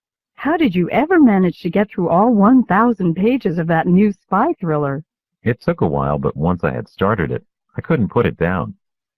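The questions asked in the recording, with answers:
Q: What does the man imply?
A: The book was so interesting that he couldn't stop reading it.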